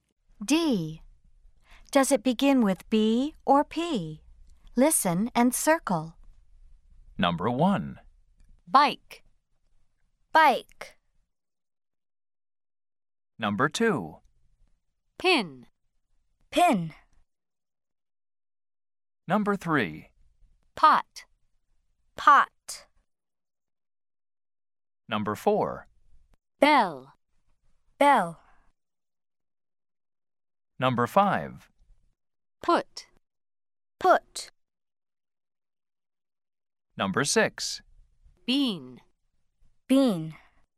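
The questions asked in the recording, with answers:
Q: Does it begin with B or P?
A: B (bike)

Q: Does it begin with B or P?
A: P (pin)

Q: Does it begin with B or P?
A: P (pot)

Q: Does it begin with B or P?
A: B (bell)

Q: Does it begin with B or P?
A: P (put)

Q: Does it begin with B or P?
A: B (bean)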